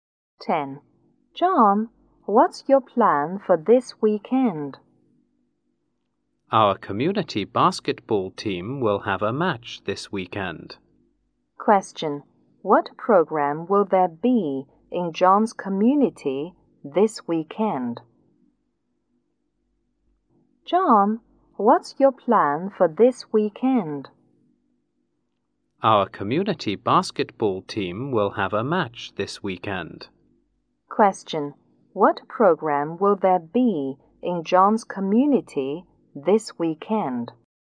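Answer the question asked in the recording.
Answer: A basketball match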